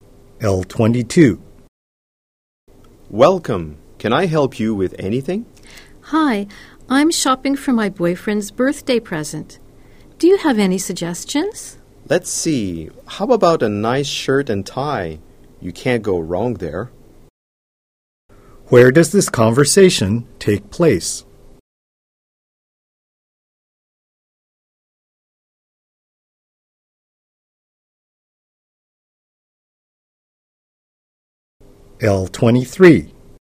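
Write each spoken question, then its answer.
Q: Where does this conversation take place?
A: In a store (clothing shop)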